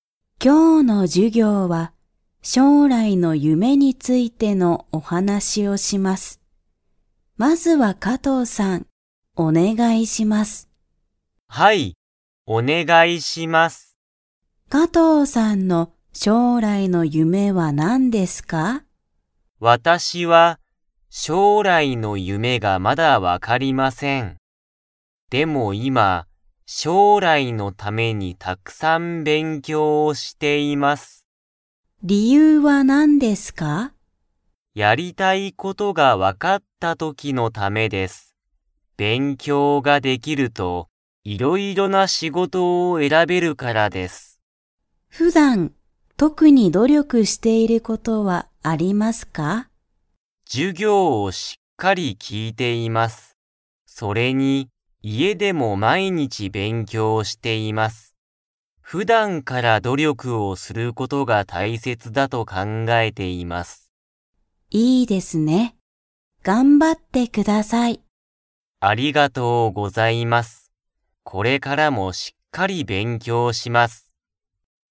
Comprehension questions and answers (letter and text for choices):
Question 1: 加藤かとうさんは、将来しょうらいの夢ゆめが 。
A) 分わかっている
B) 分わからない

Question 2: 加藤かとうさんは、家いえでどのくらい勉強べんきょうしていますか?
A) ときどき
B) 毎週まいしゅう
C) 毎日まいにち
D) 一時間いちじかん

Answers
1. B) 分わからない
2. C) 毎日まいにち

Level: Level 3